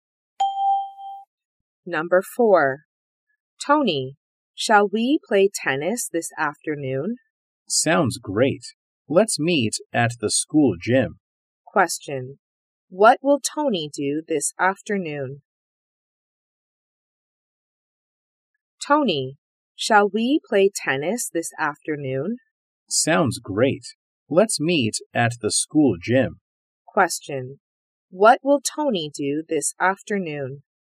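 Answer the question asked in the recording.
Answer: Play tennis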